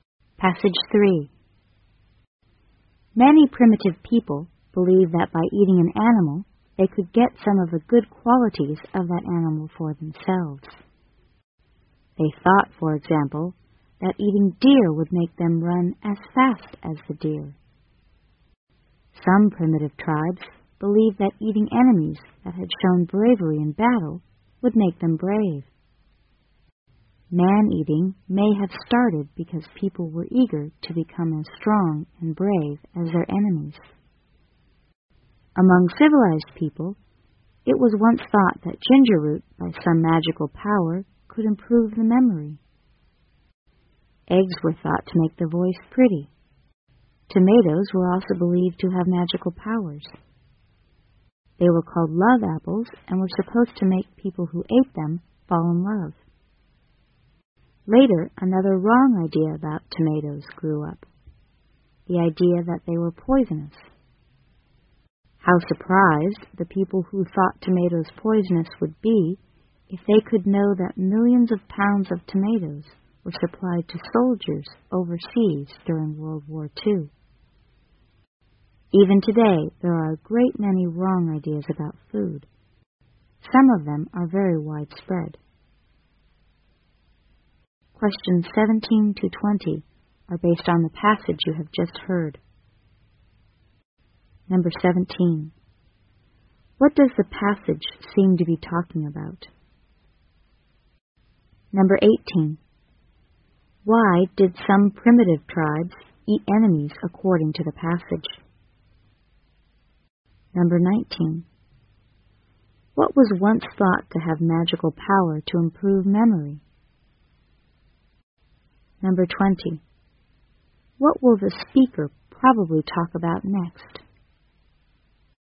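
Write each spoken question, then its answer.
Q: What does the passage seem to be talking about?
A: Wrong ideas about food

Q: Why did some primitive tribes eat enemies according to the passage?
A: To become brave like them

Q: What was once thought to have magical power to improve memory?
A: Ginger root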